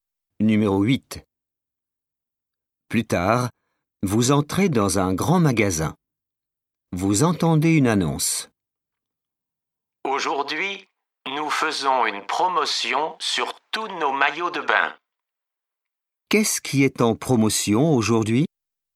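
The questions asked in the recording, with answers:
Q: Qu'est-ce qui est en promotion aujourd'hui?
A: Les maillots de bain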